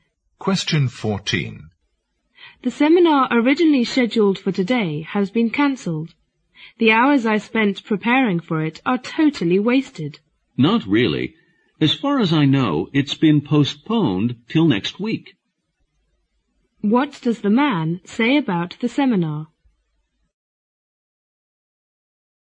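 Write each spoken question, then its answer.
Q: What does the man say about the seminar?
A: It has been postponed until next week, not cancelled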